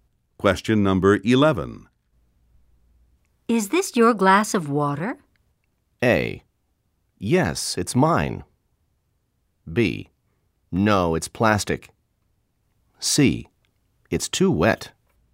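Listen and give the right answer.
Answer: A: Yes, it's mine.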